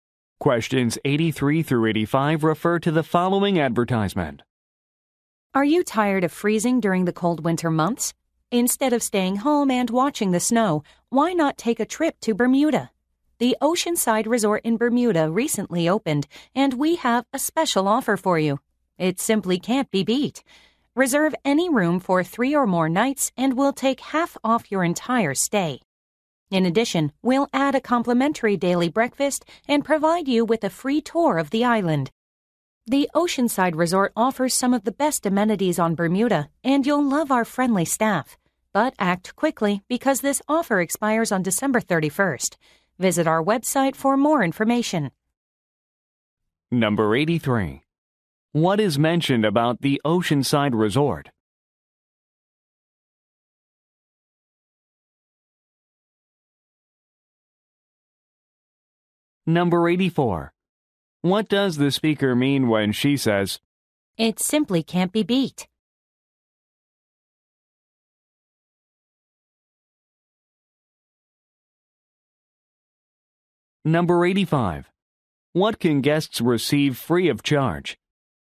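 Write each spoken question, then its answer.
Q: What is mentioned about the Oceanside Resort?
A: It recently opened

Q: What does the speaker mean when she says,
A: The offer is excellent

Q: What can guests receive free of charge?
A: Daily breakfast and a tour of the island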